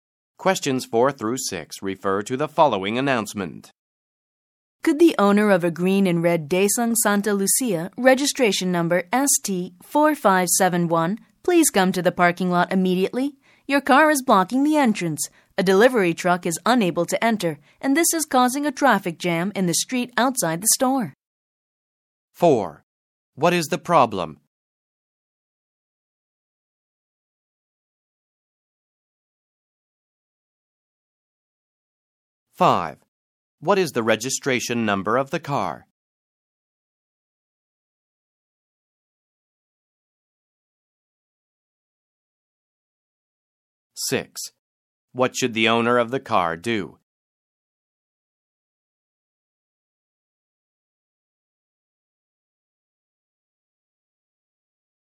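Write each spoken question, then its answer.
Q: What is the problem?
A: A car is blocking the entrance, so a delivery truck can't enter and traffic is jammed

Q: What is the registration number of the car?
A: ST4571

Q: What should the owner of the car do?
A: Come to the parking lot immediately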